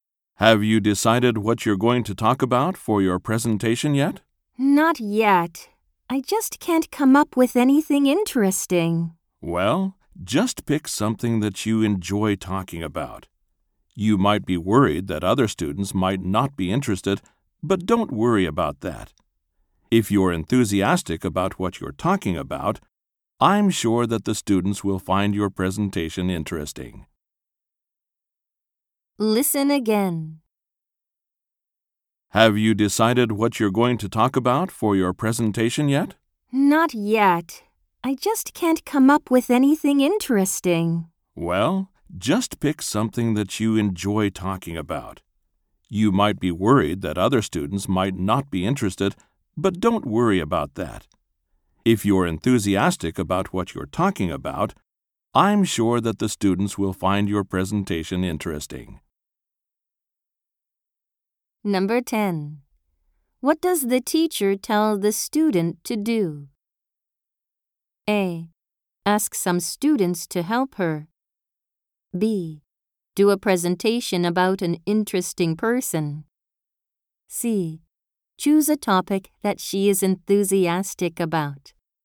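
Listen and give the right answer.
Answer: C: Choose a topic that she is enthusiastic about.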